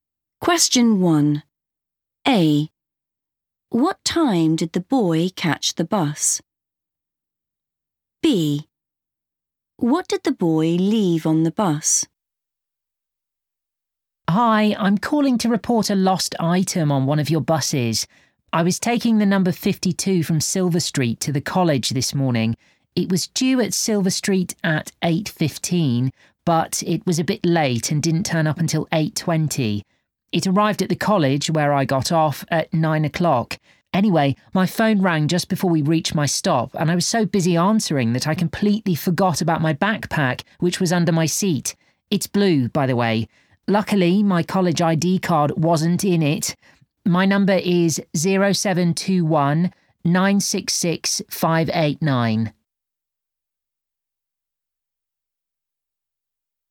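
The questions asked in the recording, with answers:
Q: What time did the boy catch the bus?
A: 8:20

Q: What did the boy leave on the bus?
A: blue backpack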